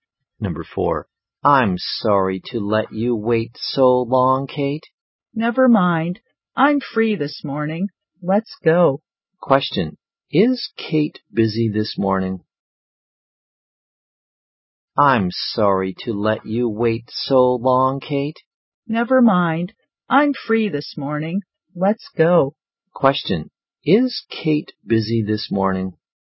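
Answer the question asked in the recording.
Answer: No, she is free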